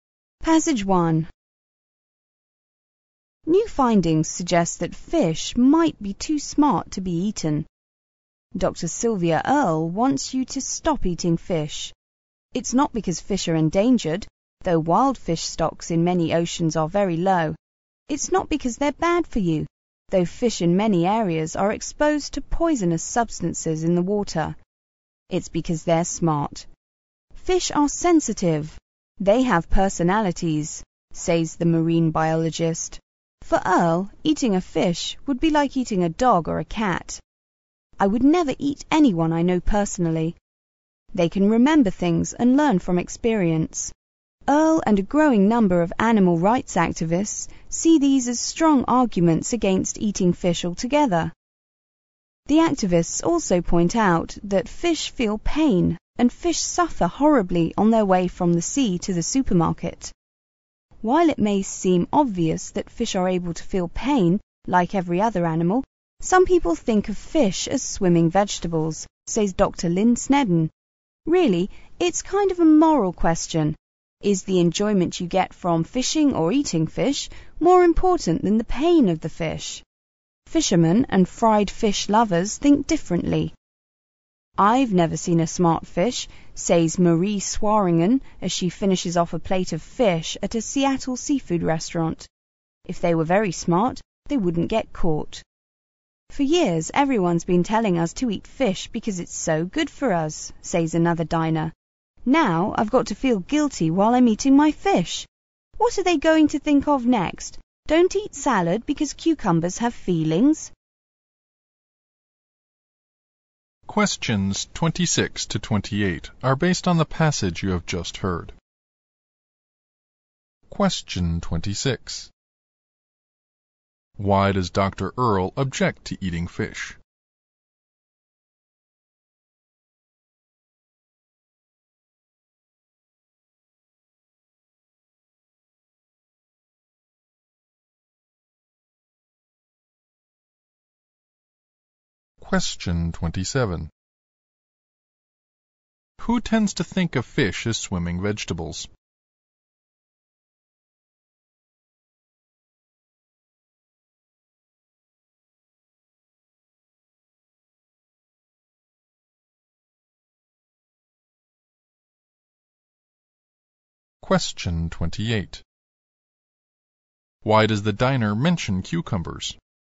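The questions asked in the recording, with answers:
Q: Why does Dr.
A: Because fish are smart and sensitive

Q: Why does the diner mention cucumbers?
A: To mock the idea that we shouldn't eat fish because they have feelings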